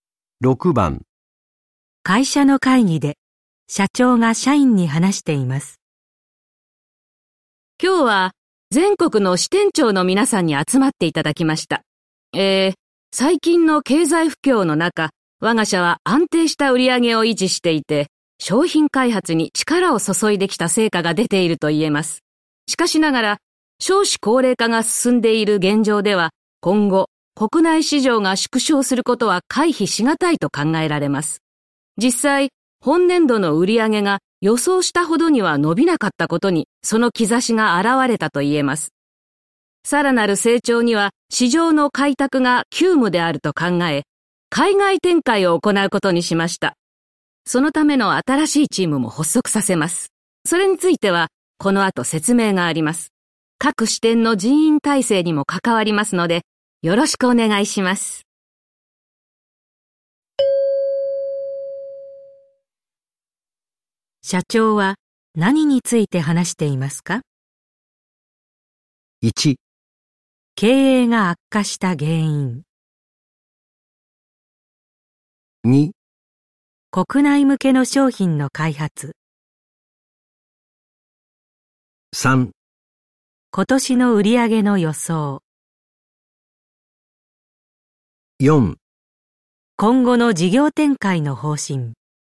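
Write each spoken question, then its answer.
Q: 社長は何について話していますか?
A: 4: 今後の事業展開の方針。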